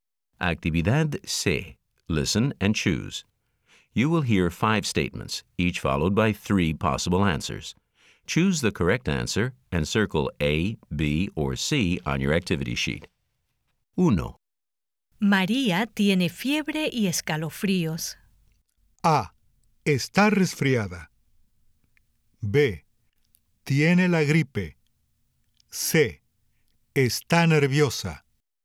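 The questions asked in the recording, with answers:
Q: María tiene fiebre y escalofríos.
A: B: Tiene la gripe.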